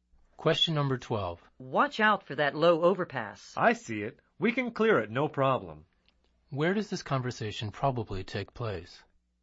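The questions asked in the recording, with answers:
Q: Where does this conversation probably take place?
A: In a vehicle on the road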